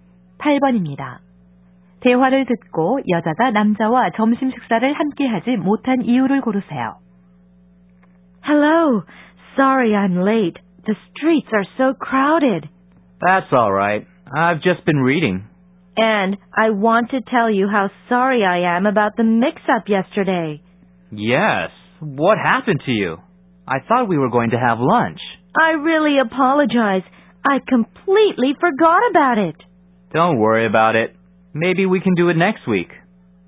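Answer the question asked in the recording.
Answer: 약속을 완전히 잊어버려서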